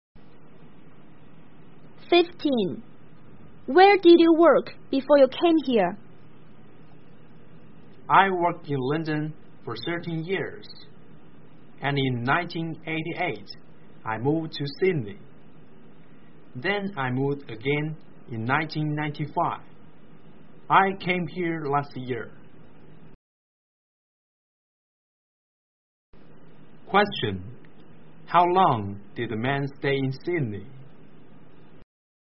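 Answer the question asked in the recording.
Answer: 7 years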